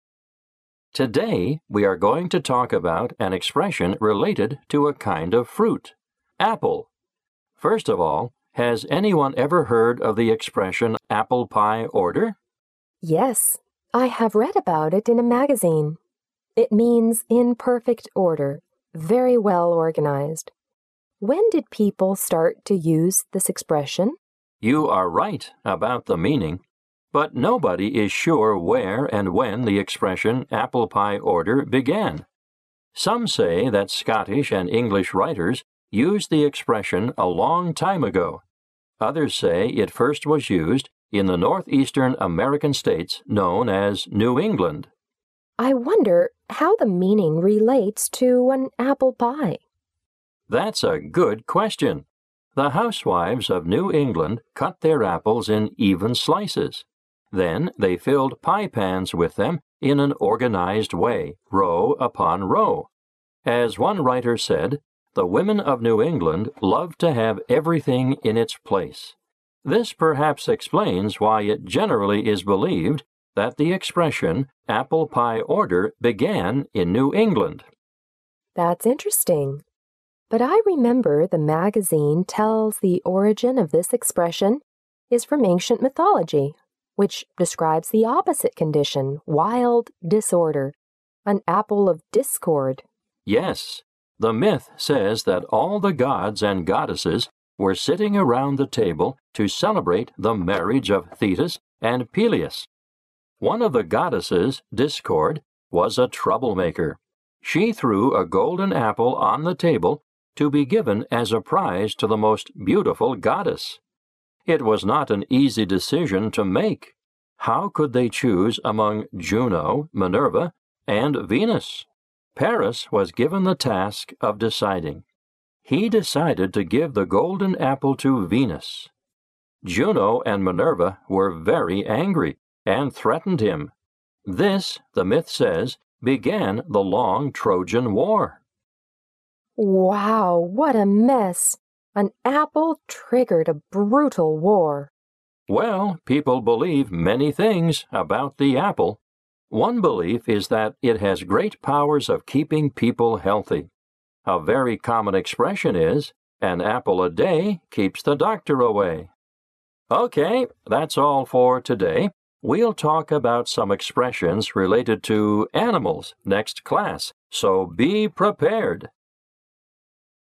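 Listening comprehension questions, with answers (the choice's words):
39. What is the discussion mainly about?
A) An expression related to apple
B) The origin of "apple pie order"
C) The meaning of "apple pie order"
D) The development of American English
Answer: An expression related to apple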